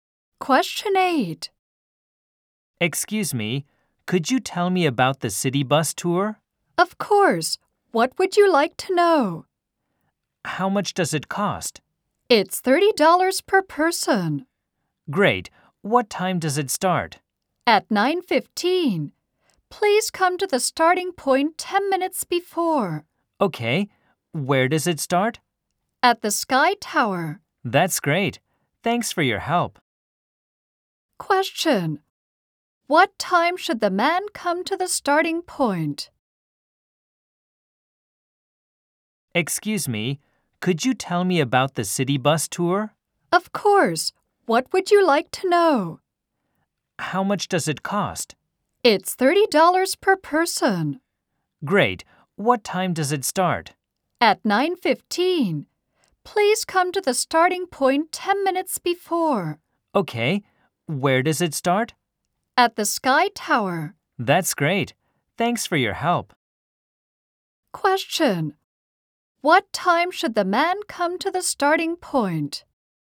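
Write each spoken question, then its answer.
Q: What time should the man come to the starting point?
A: At 9:05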